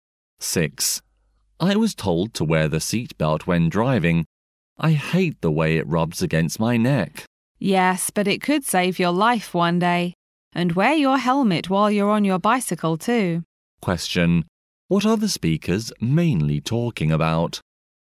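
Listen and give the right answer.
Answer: Safety measures while travelling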